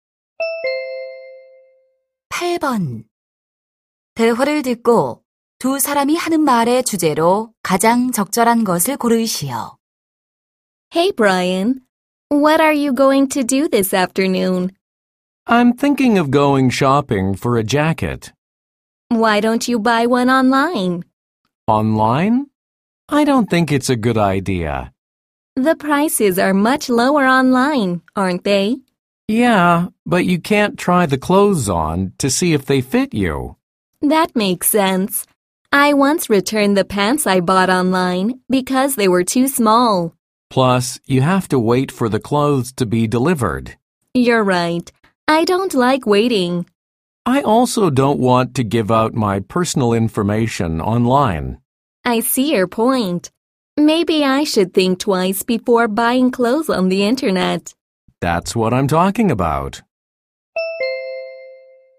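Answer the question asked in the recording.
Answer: 온라인으로 옷을 사는 것의 단점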